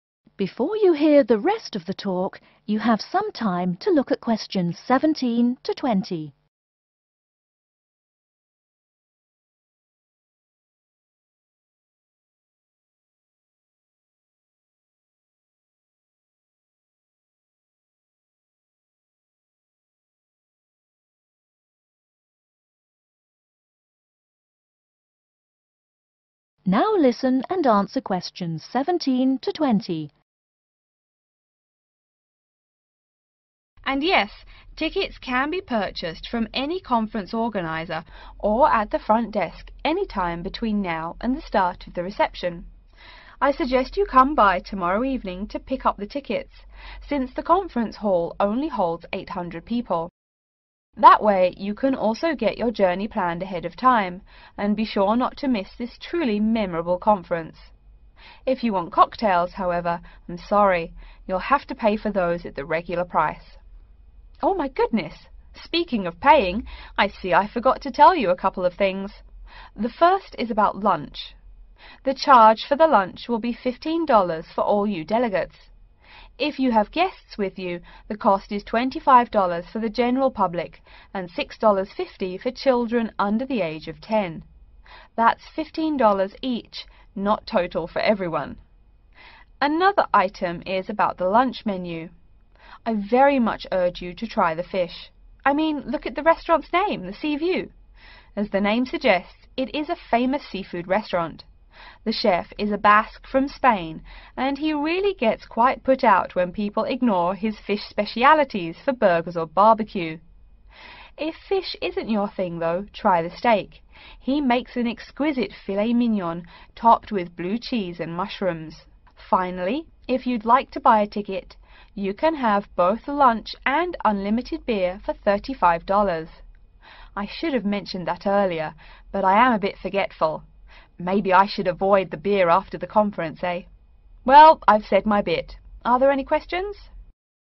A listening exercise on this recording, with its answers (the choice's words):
Choose the correct letter, A, B, or C.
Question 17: Tickets are available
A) only at the reception desk.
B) tomorrow evening.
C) at any time before the reception.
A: at any time before the reception.

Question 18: The delegates will be charged........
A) $6.50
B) $15.00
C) $25.00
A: $15.00

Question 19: The restaurant is famous for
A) steak.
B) fish.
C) barbecue.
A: fish.